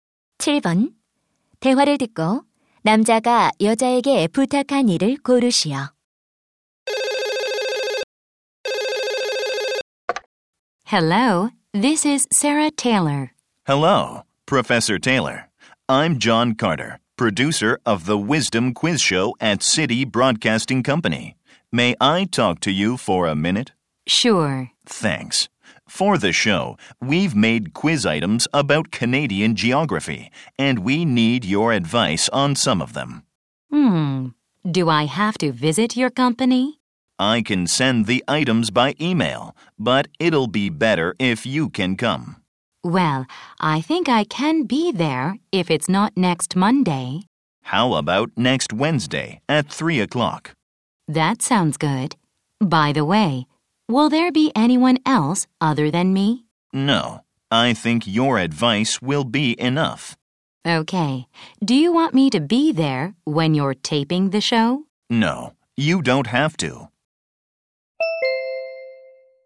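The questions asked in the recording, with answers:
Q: 대화를 듣고 남자가 여자에게 부탁한 일을 고르시오.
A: 퀴즈 문항에 대해 조언해 주기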